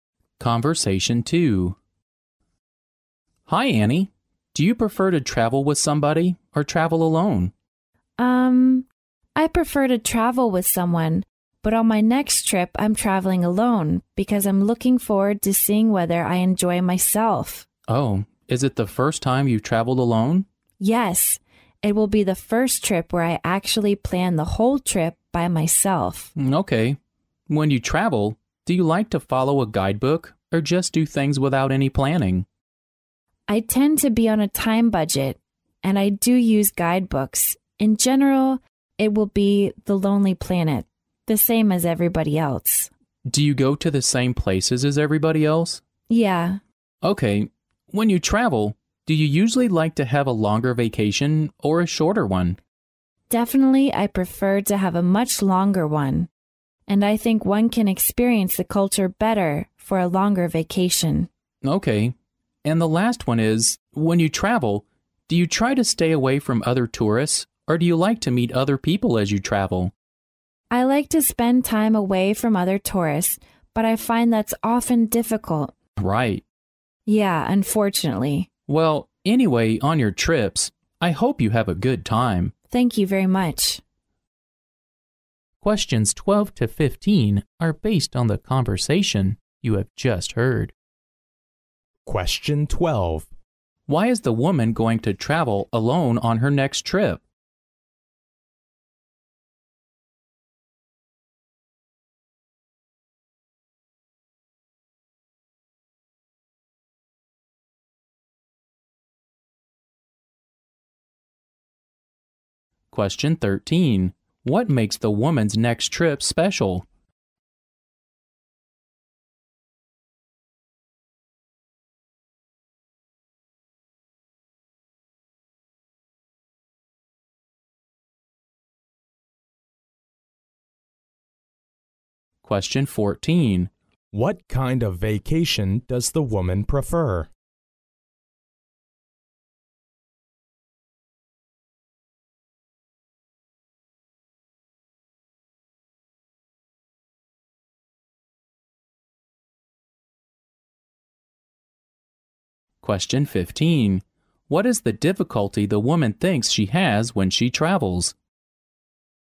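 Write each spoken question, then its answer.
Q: Why is the woman going to travel alone on her next trip?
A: To see whether she enjoys traveling alone

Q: What makes the woman's next trip special?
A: It's the first trip she has planned entirely by herself

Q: What kind of vacation does the woman prefer?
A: A longer one

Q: What is the difficulty the woman thinks she has when she travels?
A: Staying away from other tourists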